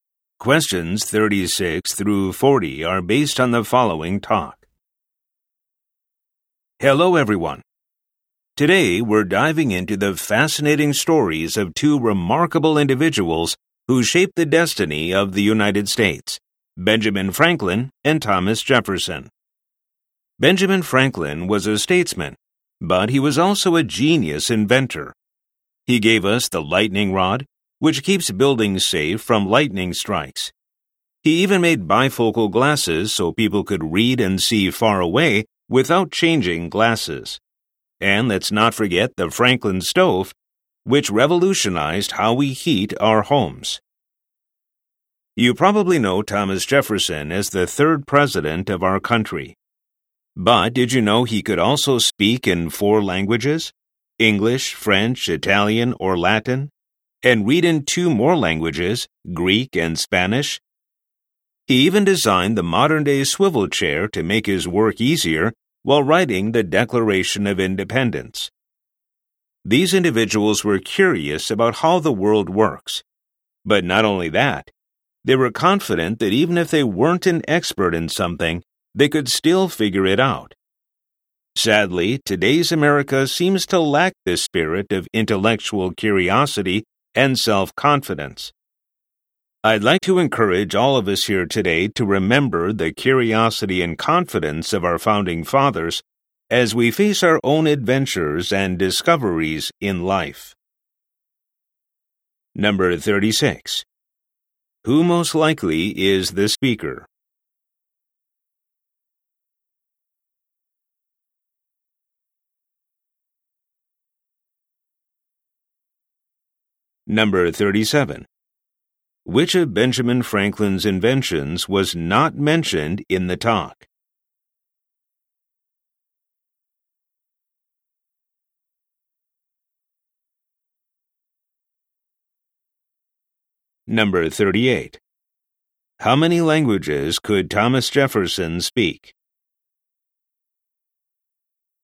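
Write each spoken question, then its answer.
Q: How many languages could Thomas Jefferson speak?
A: Four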